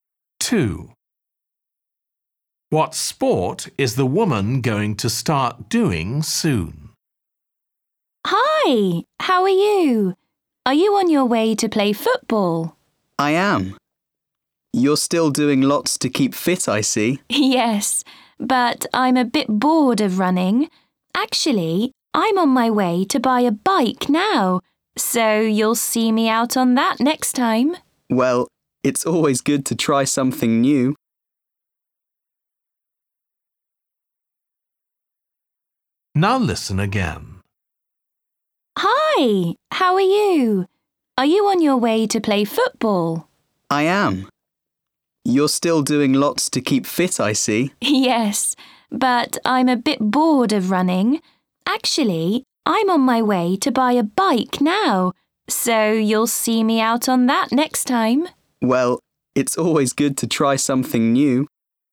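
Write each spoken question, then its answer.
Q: What sport is the woman going to start doing soon?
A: cycling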